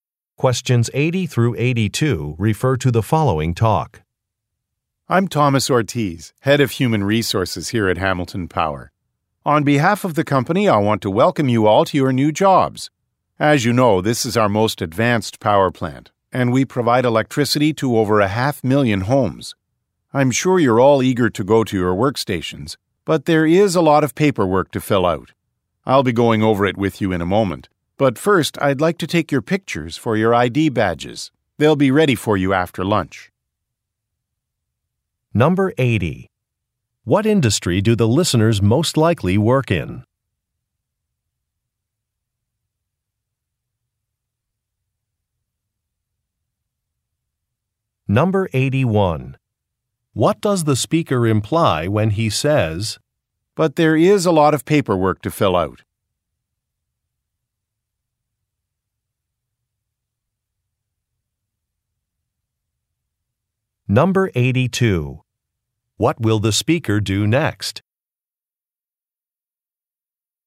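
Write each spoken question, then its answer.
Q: What industry do the listeners most likely work in?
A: Energy (electric power)

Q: What does the speaker imply when he says, "But there is a lot of paperwork to fill out"?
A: The listeners will not go to their workstations right away

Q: What will the speaker do next?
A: Take pictures for ID badges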